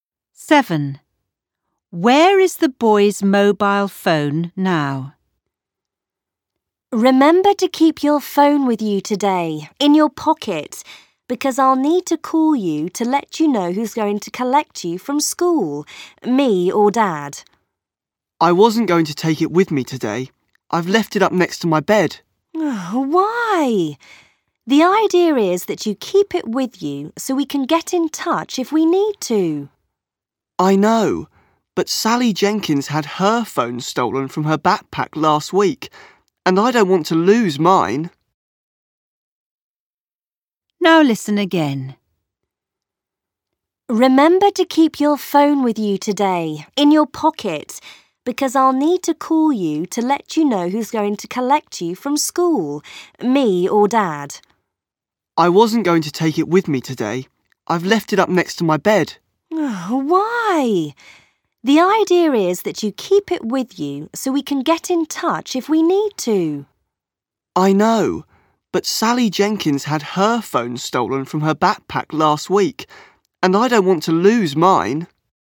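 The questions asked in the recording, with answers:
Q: Where is the boy's mobile phone now?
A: Next to his bed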